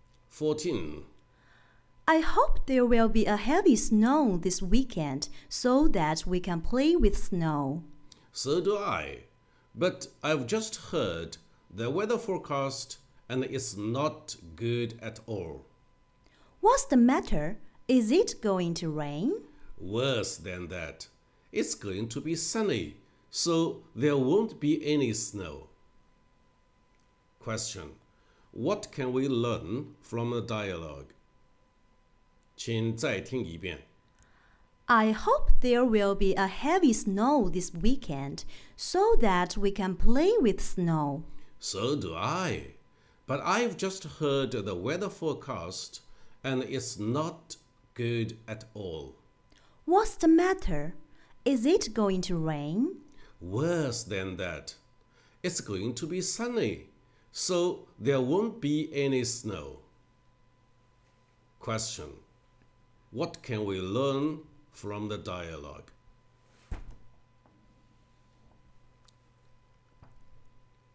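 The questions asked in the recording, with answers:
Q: What can we learn from the dialogue?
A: It will be sunny this weekend, so there won't be any snow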